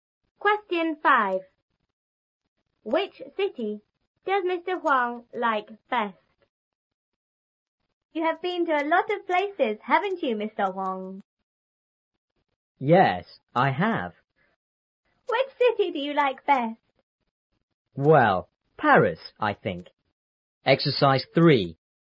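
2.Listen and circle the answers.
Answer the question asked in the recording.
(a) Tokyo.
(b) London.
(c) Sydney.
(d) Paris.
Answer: (d) Paris.

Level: 初中英语广州版3B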